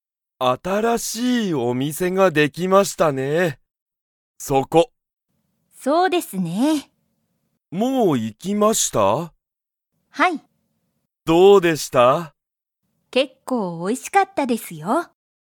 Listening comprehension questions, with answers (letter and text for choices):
松井まついさんは、その新あたらしいお店みせに行いきましたか?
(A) はい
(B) いいえ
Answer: (A) はい

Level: Level 1